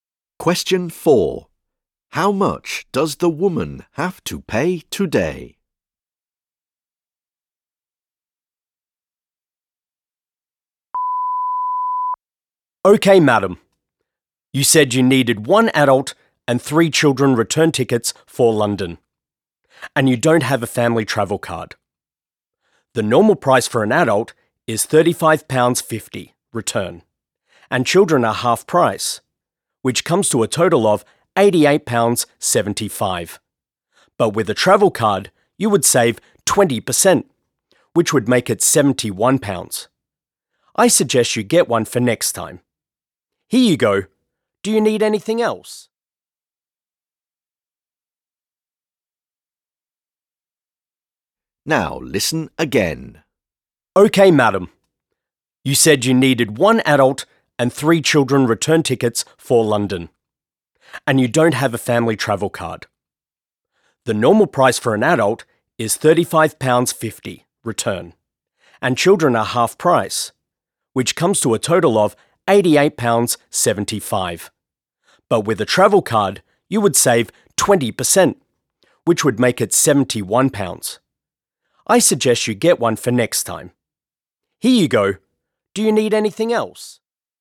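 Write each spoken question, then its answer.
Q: How much does the woman have to pay today?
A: £88.75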